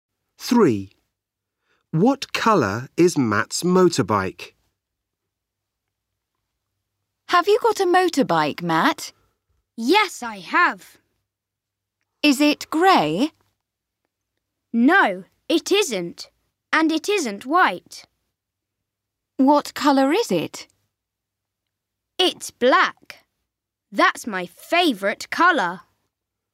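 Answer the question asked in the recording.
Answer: Black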